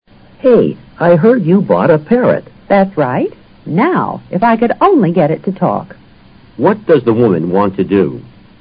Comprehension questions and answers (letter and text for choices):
What does the woman want to do?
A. Buy a parrot.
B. Talk to the parrot.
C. Teach the parrot to talk.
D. Find someone to care for her parrot.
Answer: C. Teach the parrot to talk.

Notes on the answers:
if I could only get it to talk: 这是用以表示意愿的虚拟句结构,主句省略。get it to talk: 使服学会讲话。C直陈妇女的意愿。parrot: 鹦鹉。

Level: 世博高级听说